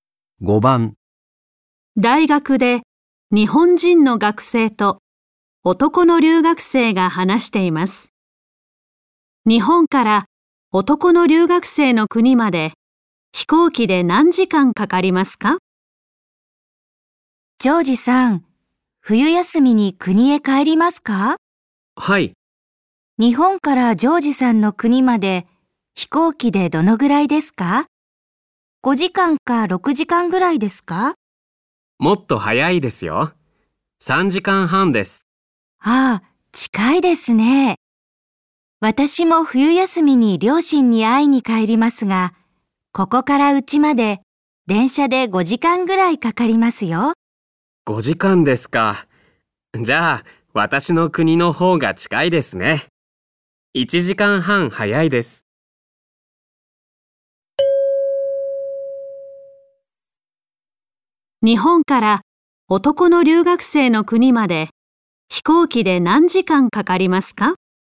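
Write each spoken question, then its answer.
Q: 日本から男の留学生の国まで飛行機で何時間かかりますか?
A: 3時間半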